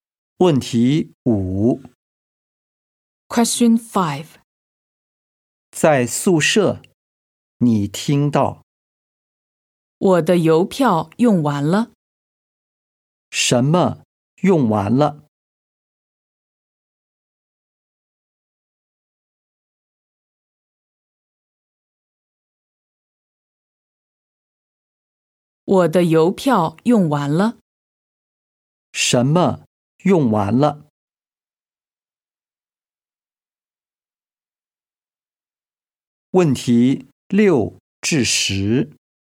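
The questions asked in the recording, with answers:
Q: 什么用完了?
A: 邮票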